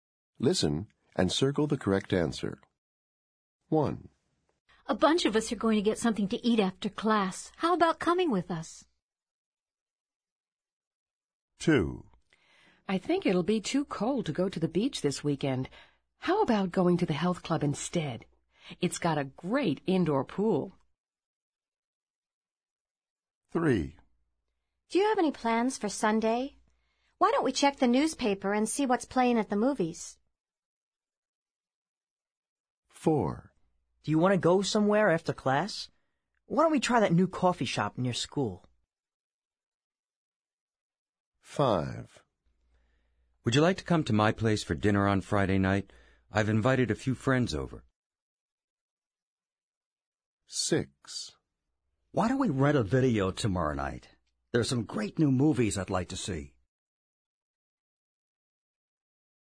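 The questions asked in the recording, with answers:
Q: What is each invitation for?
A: to get something to eat after class

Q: What is each invitation for?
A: to go to the health club (indoor pool)

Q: What is each invitation for?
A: to go to the movies on Sunday

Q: What is each invitation for?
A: to go to the new coffee shop after class

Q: What is each invitation for?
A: dinner on Friday night

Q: What is each invitation for?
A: to rent a video tomorrow night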